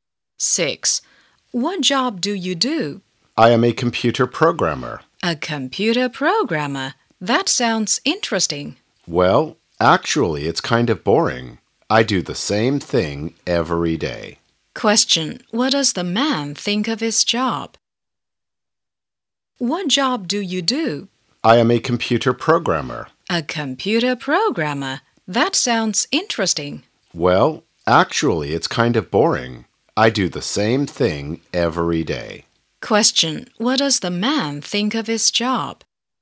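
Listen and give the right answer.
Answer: It's boring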